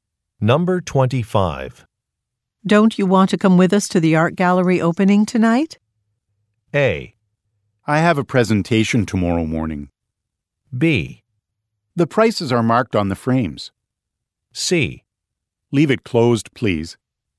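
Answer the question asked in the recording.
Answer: A: I have a presentation tomorrow morning.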